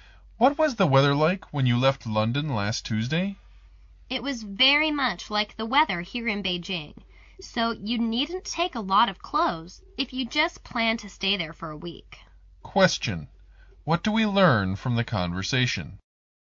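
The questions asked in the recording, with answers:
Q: What do we learn from the conversation?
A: The weather in London is much like Beijing's, so few clothes are needed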